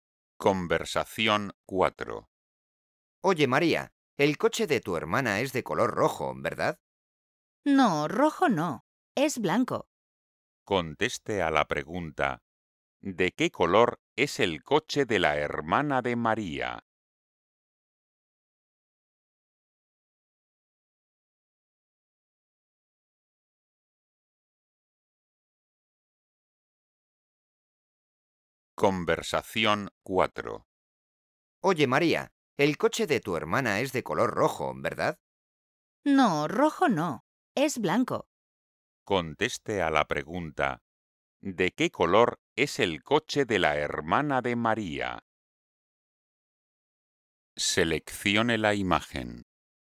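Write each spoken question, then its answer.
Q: ¿de qué color es el coche de la hermana de María?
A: blanco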